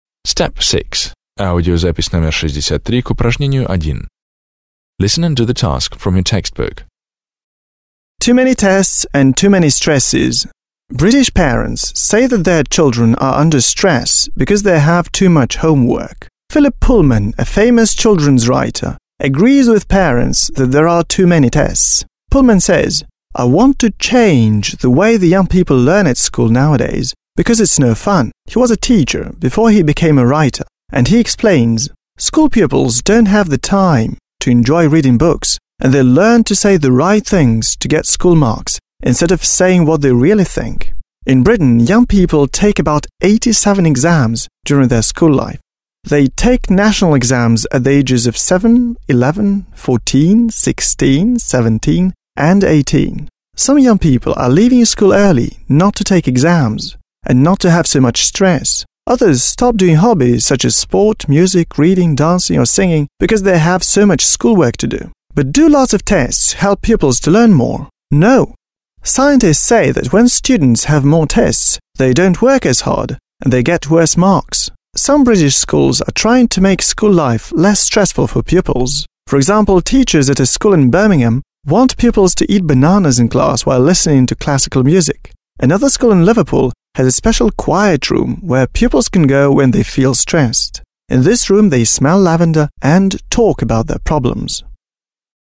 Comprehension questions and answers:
1. Listen to the text, (63), and decide which facts mentioned below are true, false and which are not stated.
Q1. Parents in Britain think that their children are overworked.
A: True

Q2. Philip Pullman is now a schoolteacher.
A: False

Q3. Mr Pullman wants school to be more fun.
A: True

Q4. Mr Pullman wrote several articles about children's psychology.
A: Not stated

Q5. British children take 78 exams while they are at school.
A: False

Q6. Tests don't help pupils in their studies.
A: True

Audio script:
British parents say that their children are under stress because they have too much homework. Philip Pullman, a famous children's writer, agrees with parents that there are too many tests. Pullman says: "I want to change the way the young people learn at school nowadays because it's no fun." He was a teacher before he became a writer and he explains:
"School pupils don't have the time to enjoy reading books and they learn to say the right things to get school marks instead of saying what they really think. In Britain young people take about 87 exams during their school life. They take national exams at the ages of 7, 11, 14, 16, 17 and 18. Some young people are leaving school early in order not to take exams and not to have so much stress. Others stop doing hobbies such as sport, music, reading, dancing or singing because they have so much schoolwork to do. But do lots of tests help pupils to learn more? No! Scientists say that when students have more tests, they don't work as hard and they get worse marks."
Some British schools are trying to make school life less stressful for pupils. For example, teachers at a school in Birmingham want pupils to eat bananas in class while listening to classical music.
Another school in Liverpool has a special quiet room where pupils can go when they feel stressed. In this room they smell lavender and talk about their problems.

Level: 9 класс